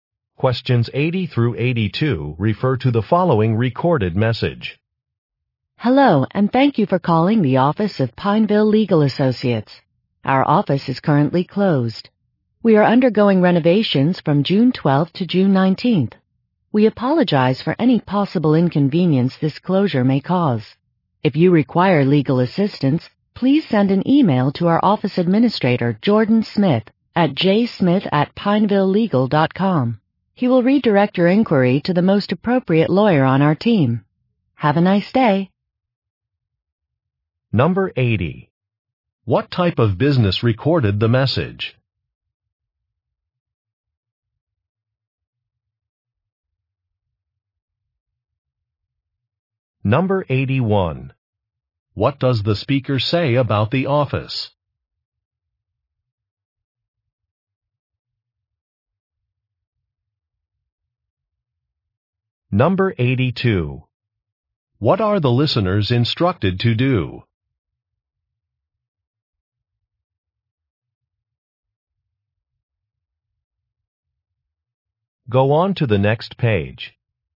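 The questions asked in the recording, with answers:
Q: What type of business recorded the message?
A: A law firm

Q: What does the speaker say about the office?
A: It is closed for renovations

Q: What are the listeners instructed to do?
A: Send an email to the office administrator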